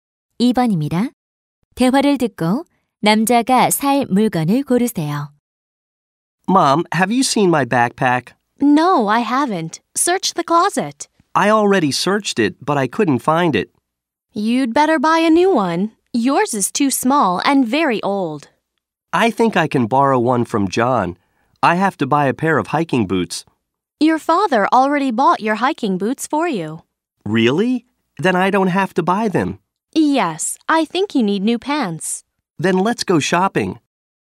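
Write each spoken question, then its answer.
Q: 대화를 듣고 남자가 살 물건을 고르세요.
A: 바지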